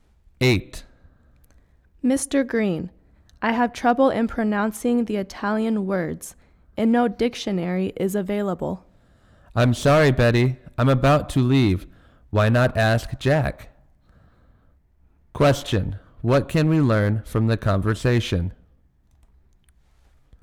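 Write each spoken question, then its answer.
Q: What can we learn from the conversation?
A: Mr. Green can't help Betty now and suggests she ask Jack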